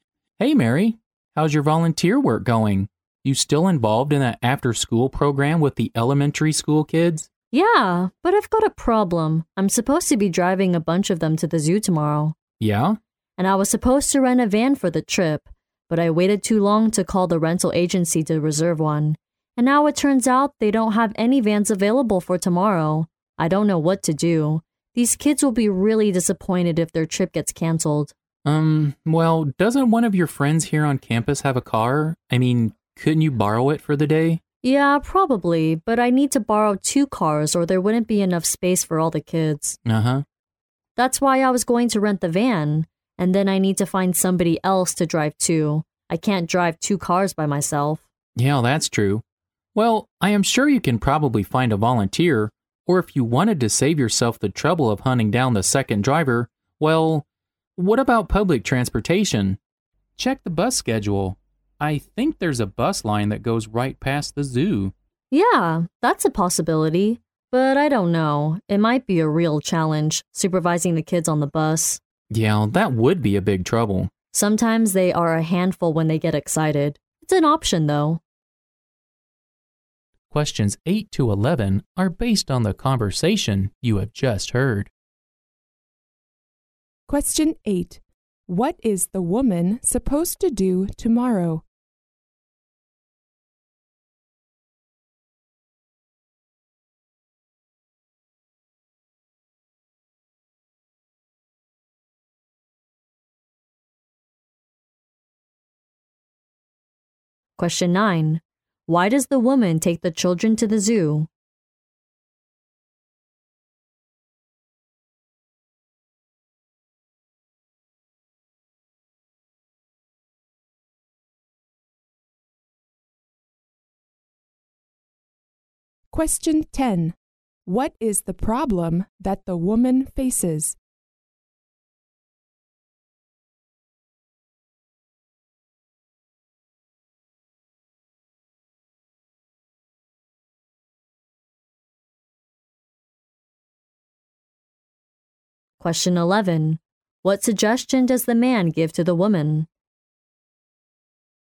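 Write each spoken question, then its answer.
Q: What is the woman supposed to do tomorrow?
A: Drive a group of elementary school kids to the zoo.

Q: What is the problem that the woman faces?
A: She waited too long to reserve a van, and none are available for tomorrow.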